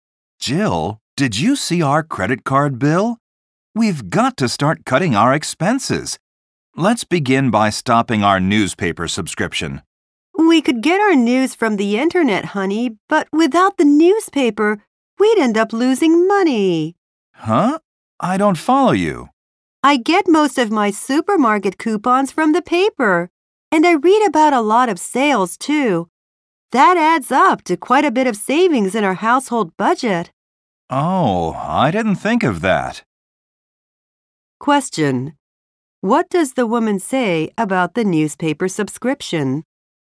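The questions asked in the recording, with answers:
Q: What does the woman say about the newspaper subscription?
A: Canceling it would end up costing them money, because the paper's coupons and sale ads save them a lot.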